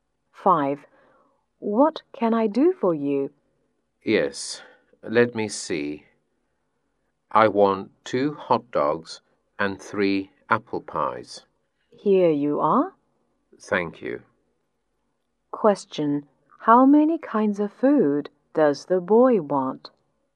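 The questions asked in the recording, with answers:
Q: how many kinds of food does the boy want?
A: Two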